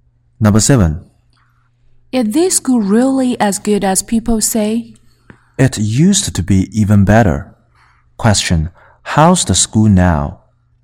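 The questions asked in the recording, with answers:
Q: How's the school now?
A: Not as good as it used to be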